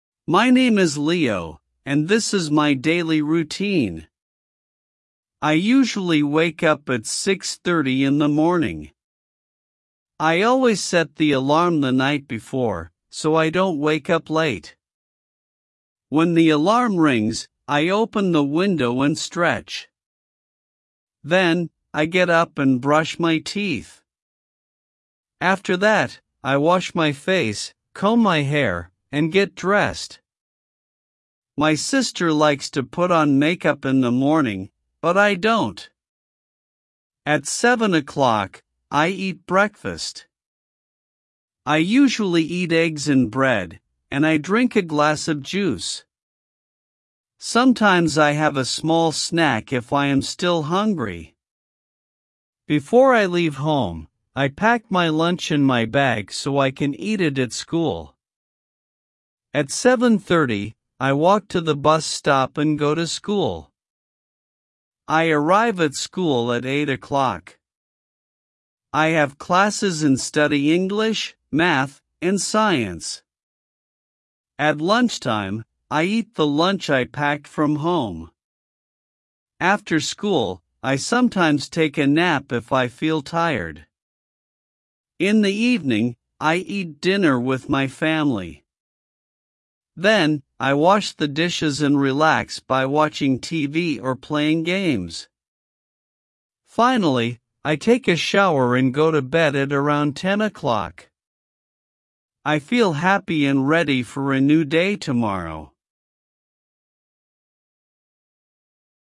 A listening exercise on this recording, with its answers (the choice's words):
Comprehension Quiz:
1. What time does Leo usually wake up?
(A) 5:00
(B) 6:30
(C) 7:30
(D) 8:00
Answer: 6:30

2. What does Leo do when the alarm rings?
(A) He eats breakfast.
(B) He opens the window and stretches.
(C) He goes to school.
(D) He takes a nap.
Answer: He opens the window and stretches.

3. What does Leo do after he brushes his teeth?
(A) He washes his face and combs his hair.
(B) He leaves home.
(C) He eats lunch.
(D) He goes to bed.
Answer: He washes his face and combs his hair.

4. Who likes to put on makeup in the morning?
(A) Leo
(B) His mother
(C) His sister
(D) His friend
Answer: His sister

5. What does Leo usually drink for breakfast?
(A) Milk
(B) Juice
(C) Coffee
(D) Tea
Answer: Juice

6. What does Leo pack before he leaves home?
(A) His books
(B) His lunch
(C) His toys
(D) His clothes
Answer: His lunch

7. What time does Leo arrive at school?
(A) 7:00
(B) 8:00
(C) 9:00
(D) 10:00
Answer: 8:00

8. What subjects does Leo study?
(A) English, math, and science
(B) Art, music, and sports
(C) History and geography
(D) Cooking and dancing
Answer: English, math, and science

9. What does Leo sometimes do after school when he is tired?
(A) He plays games.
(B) He takes a nap.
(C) He goes shopping.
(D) He cleans his room.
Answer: He takes a nap.

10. What does Leo do in the evening before going to bed?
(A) He goes to school.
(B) He practices soccer.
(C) He relaxes and takes a shower.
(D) He wakes up again.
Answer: He relaxes and takes a shower.

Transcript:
My Daily Routine
My name is Leo, and this is my daily routine.
I usually wake up at 6:30 in the morning. I always set the alarm the night before, so I don't wake up late.
When the alarm rings, I open the window and stretch. Then, I get up and brush my teeth.
After that, I wash my face, comb my hair, and get dressed. My sister likes to put on makeup in the morning, but I don't.
At 7:00, I eat breakfast. I usually eat eggs and bread, and I drink a glass of juice. Sometimes I have a small snack if I am still hungry.
Before I leave home, I pack my lunch in my bag so I can eat it at school. At 7:30, I walk to the bus stop and go to school.
I arrive at school at 8:00. I have classes and study English, math, and science.
At lunchtime, I eat the lunch I packed from home. After school, I sometimes take a nap if I feel tired.
In the evening, I eat dinner with my family. Then, I wash the dishes and relax by watching TV or playing games. Finally, I take a shower and go to bed at around 10:00.
I feel happy and ready for a new day tomorrow